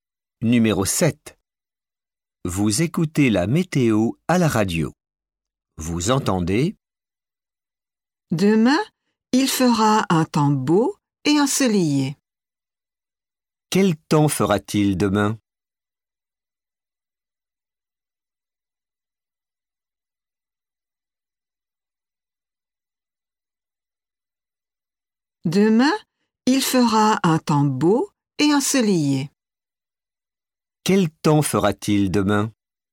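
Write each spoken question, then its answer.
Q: Quel temps fera-t-il demain?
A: Beau et ensoleillé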